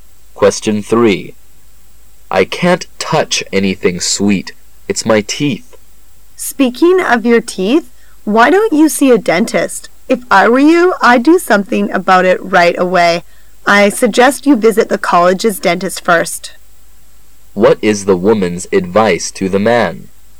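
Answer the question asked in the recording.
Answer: To see the college dentist right away.

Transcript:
[解析] M:I can't touch anything sweet.It's my teeth. W:Speaking of your teeth,why don't you see a dentist? If I were you,I'd do something about it right away.I suggest you visit the college's dentist first. Q:What is the woman's advice to the man?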